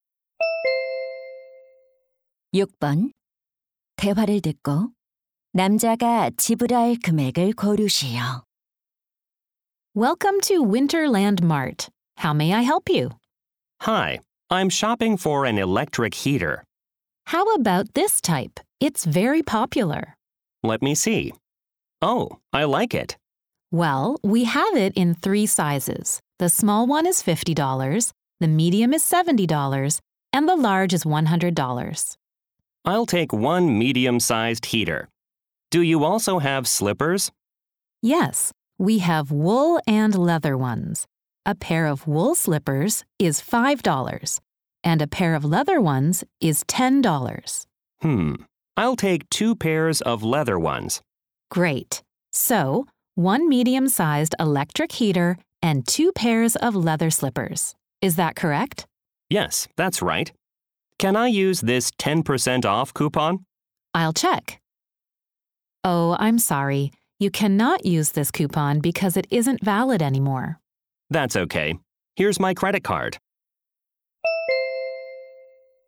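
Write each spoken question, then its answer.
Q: 대화를 듣고 남자가 지불할 금액을 고르시오.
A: $90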